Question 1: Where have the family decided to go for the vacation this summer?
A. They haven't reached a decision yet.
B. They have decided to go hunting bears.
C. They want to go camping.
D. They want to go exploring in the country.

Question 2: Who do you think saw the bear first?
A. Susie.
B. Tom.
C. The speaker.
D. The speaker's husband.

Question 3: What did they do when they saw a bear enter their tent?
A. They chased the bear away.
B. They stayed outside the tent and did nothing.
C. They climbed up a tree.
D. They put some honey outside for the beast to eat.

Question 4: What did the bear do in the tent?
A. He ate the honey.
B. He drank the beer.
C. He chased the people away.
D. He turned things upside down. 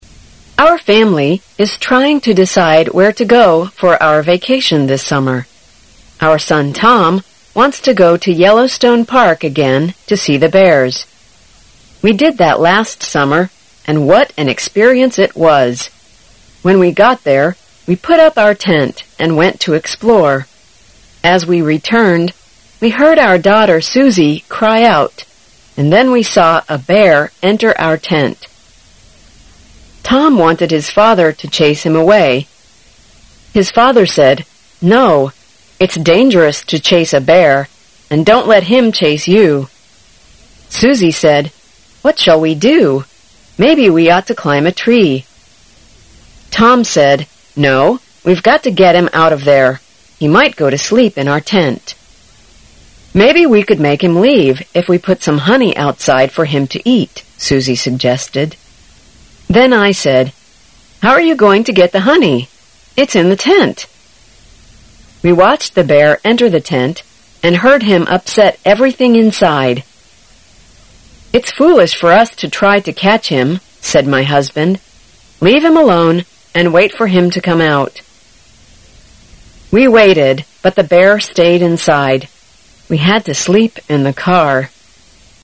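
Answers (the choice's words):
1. They haven't reached a decision yet.
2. Susie.
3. They stayed outside the tent and did nothing.
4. He turned things upside down.

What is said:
A
[解析] 17-20 Our family is trying to decide where to go for our vacation this summer. Our son Tom wants to go to Yellow Stone Park again to see the bears. We did that last summer, and what an experience it was! When we got there we put up our tent and went to explore. As we returned, we heard our daughter Susie cry out and then we saw a bear enter our tent. Tom wanted his father to chase him away. His father said: "No, it's dangerous to chase a bear. And don't let him chase you." Susie said. "What shall we do? May be we ought to climb a tree. "Tom said:" No, we've got to get him out of there. He might go to sleep in our tent." "Maybe we could make him leave if we put some honey outside for him to eat." Susie suggested. 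Then I said: "How are you going to get the honey? It's in the tent. "We watched the bear enter the tent and heard him upset everything inside. "It's foolish for us to try to catch him." said my husband. "Leave him alone and wait for him to come out." We waited but the bear stayed inside. We had to sleep in the car.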